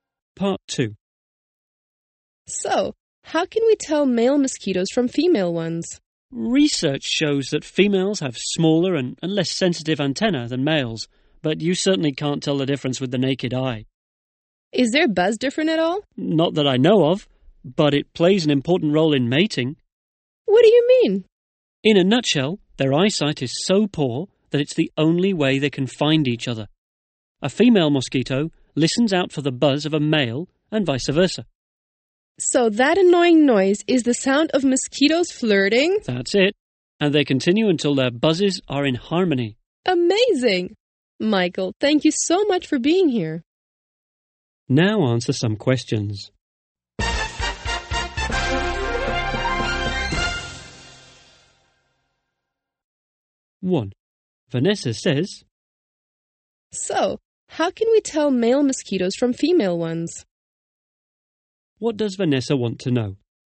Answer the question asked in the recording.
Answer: Vanessa wants to know how somebody can understand which mosquito is male and which is female.